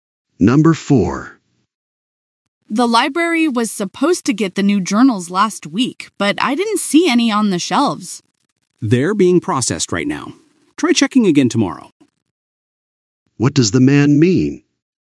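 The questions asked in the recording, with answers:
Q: What does the man mean?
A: The journals are being processed; check again tomorrow.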